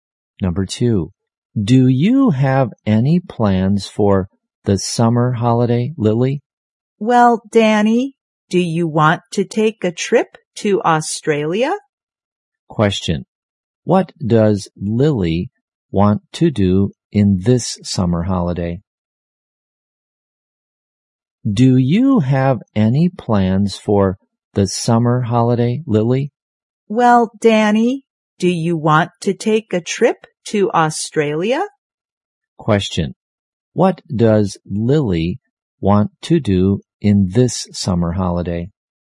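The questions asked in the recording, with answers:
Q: what does Lily want to do in this summer holiday?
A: Take a trip to Australia.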